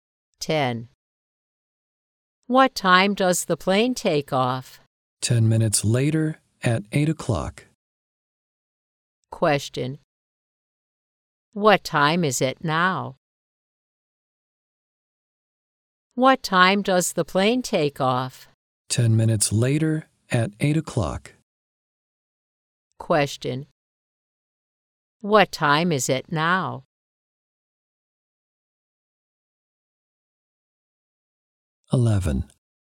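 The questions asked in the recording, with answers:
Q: What time is it now?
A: 7:50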